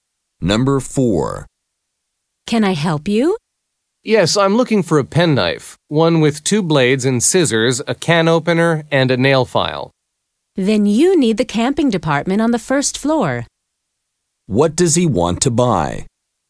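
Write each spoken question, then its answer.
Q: What does he want to buy?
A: A penknife with two blades, scissors, a can opener and a nail file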